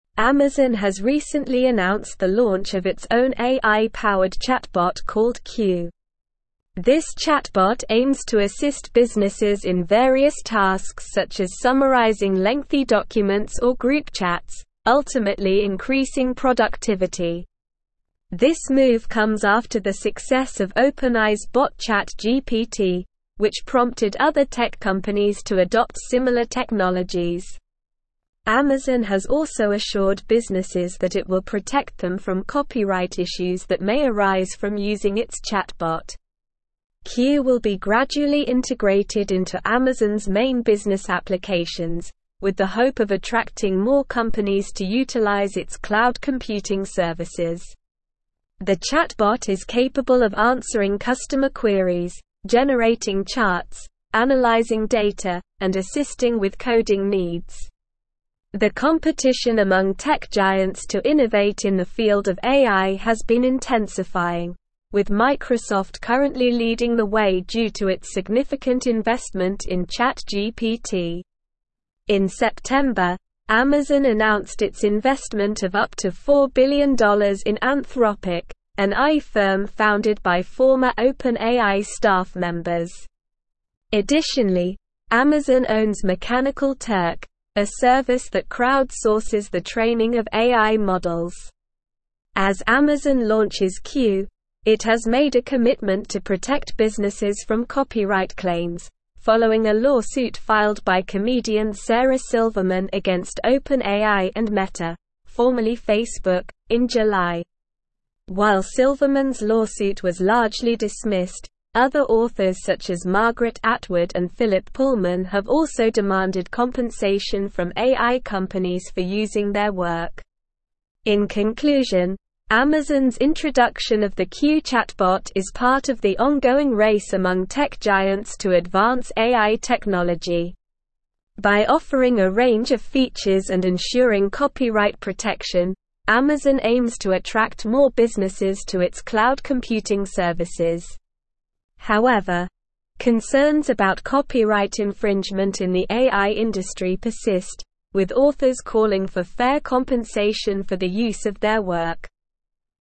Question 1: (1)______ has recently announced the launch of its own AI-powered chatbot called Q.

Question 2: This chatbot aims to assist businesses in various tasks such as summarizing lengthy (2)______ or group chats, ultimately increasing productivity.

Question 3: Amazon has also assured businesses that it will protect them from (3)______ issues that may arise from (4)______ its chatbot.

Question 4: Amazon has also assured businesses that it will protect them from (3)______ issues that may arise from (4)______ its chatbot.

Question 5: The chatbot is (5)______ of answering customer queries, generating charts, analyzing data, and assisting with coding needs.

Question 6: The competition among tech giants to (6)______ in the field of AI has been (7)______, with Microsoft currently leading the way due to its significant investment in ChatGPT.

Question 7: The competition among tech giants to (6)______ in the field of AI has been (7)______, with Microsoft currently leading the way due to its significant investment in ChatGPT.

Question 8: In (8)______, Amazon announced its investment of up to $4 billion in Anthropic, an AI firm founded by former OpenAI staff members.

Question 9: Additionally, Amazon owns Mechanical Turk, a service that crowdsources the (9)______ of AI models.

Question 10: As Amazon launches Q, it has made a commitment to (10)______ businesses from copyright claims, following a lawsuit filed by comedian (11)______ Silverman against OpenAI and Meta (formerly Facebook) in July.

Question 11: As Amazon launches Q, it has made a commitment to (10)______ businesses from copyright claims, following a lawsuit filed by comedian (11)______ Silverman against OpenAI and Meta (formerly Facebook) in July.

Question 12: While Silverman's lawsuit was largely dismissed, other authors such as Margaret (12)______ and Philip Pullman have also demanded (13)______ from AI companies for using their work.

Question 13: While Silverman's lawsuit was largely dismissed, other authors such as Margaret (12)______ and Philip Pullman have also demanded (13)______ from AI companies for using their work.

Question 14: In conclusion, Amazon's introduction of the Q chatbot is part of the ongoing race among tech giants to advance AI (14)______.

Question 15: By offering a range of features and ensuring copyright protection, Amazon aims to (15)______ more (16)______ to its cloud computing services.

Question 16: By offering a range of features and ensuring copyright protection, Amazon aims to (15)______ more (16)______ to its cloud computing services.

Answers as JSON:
{"1": "Amazon", "2": "documents", "3": "copyright", "4": "using", "5": "capable", "6": "innovate", "7": "intensifying", "8": "September", "9": "training", "10": "protect", "11": "Sarah", "12": "Atwood", "13": "compensation", "14": "technology", "15": "attract", "16": "businesses"}

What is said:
Amazon has recently announced the launch of its own AI-powered chatbot called Q. This chatbot aims to assist businesses in various tasks such as summarizing lengthy documents or group chats, ultimately increasing productivity. This move comes after the success of OpenAI's bot ChatGPT, which prompted other tech companies to adopt similar technologies. Amazon has also assured businesses that it will protect them from copyright issues that may arise from using its chatbot.
Q will be gradually integrated into Amazon's main business applications, with the hope of attracting more companies to utilize its cloud computing services. The chatbot is capable of answering customer queries, generating charts, analyzing data, and assisting with coding needs. The competition among tech giants to innovate in the field of AI has been intensifying, with Microsoft currently leading the way due to its significant investment in ChatGPT.
In September, Amazon announced its investment of up to $4 billion in Anthropic, an AI firm founded by former OpenAI staff members. Additionally, Amazon owns Mechanical Turk, a service that crowdsources the training of AI models. As Amazon launches Q, it has made a commitment to protect businesses from copyright claims, following a lawsuit filed by comedian Sarah Silverman against OpenAI and Meta (formerly Facebook) in July. While Silverman's lawsuit was largely dismissed, other authors such as Margaret Atwood and Philip Pullman have also demanded compensation from AI companies for using their work.
In conclusion, Amazon's introduction of the Q chatbot is part of the ongoing race among tech giants to advance AI technology. By offering a range of features and ensuring copyright protection, Amazon aims to attract more businesses to its cloud computing services. However, concerns about copyright infringement in the AI industry persist, with authors calling for fair compensation for the use of their work.

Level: Level 4